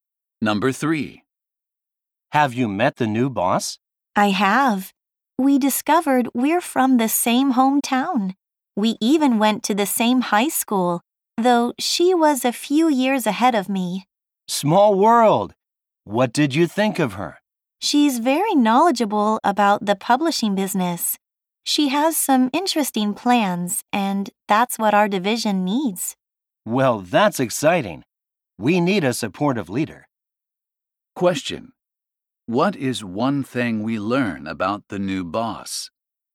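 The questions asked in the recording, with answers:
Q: What is one thing we learn about the new boss?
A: She is from the same hometown and has interesting plans; she knows publishing well.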